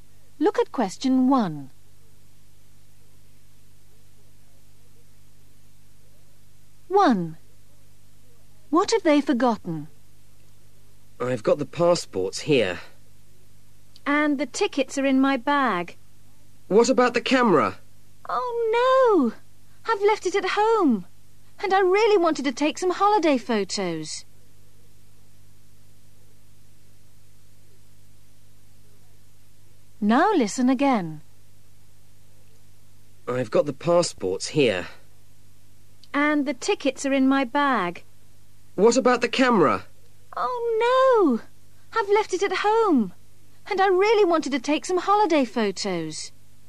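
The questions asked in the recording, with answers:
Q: What have they forgotten?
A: The camera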